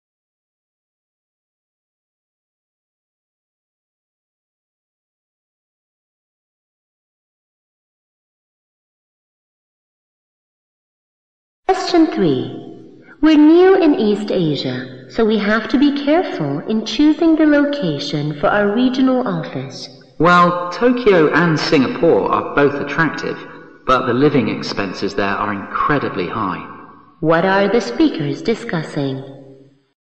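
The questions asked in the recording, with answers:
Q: What are the speakers discussing?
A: Where to locate their regional office in East Asia.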